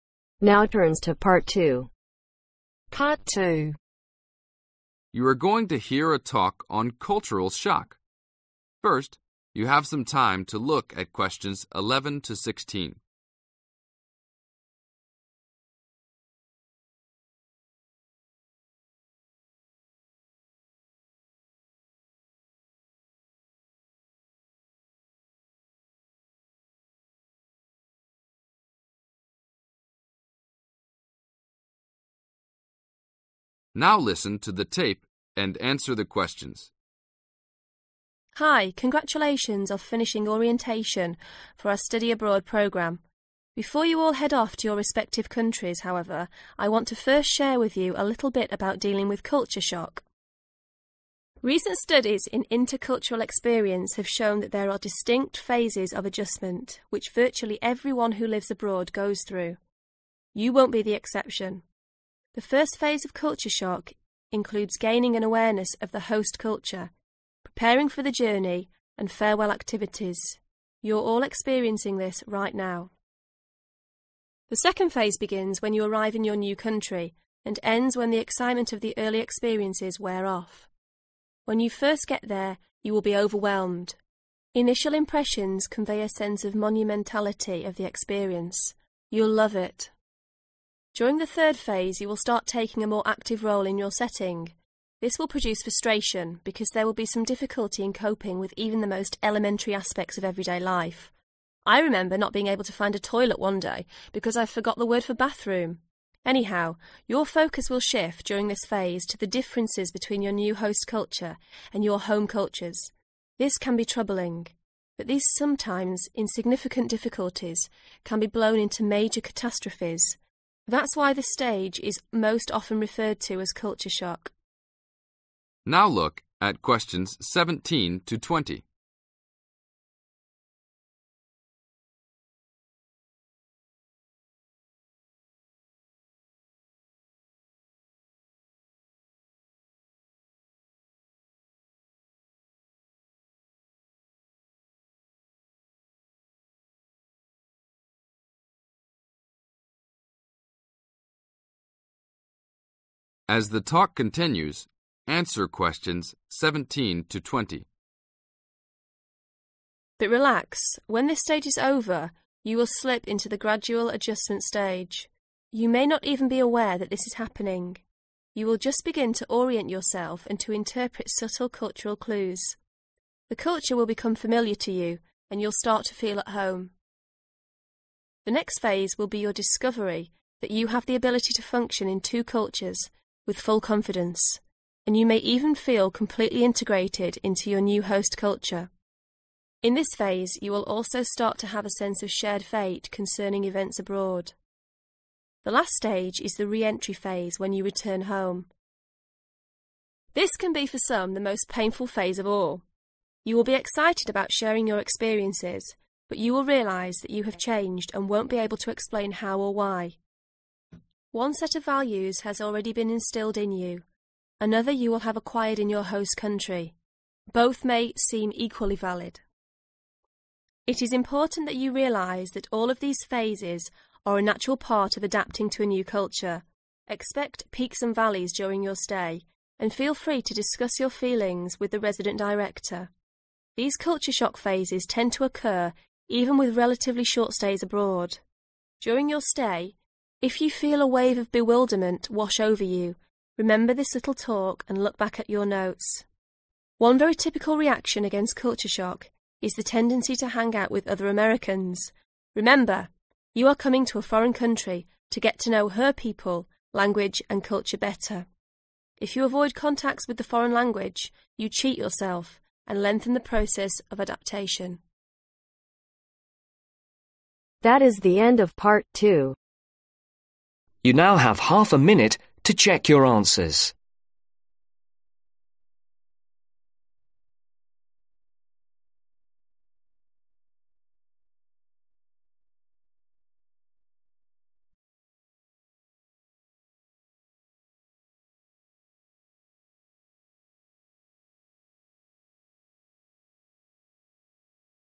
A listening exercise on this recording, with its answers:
Answer the questions below.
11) gain an ............ of new culture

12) prepare for the ............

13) say ............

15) What emotion will you experience in the third phase ?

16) Which phase is most commonly known as "culture shock" ?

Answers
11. Awareness
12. Journey
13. Farewell
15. Frustration
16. Third